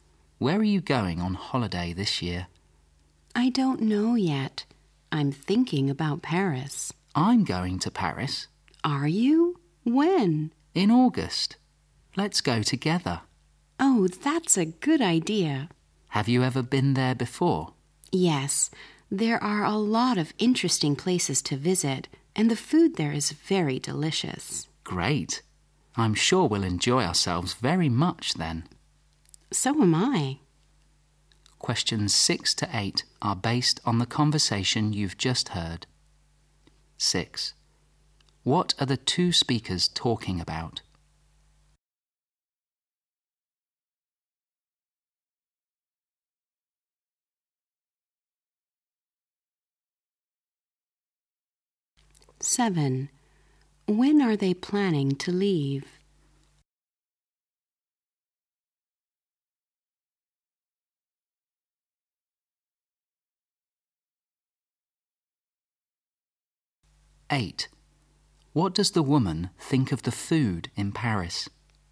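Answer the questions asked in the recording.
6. Their holiday in Paris
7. In August
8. Very delicious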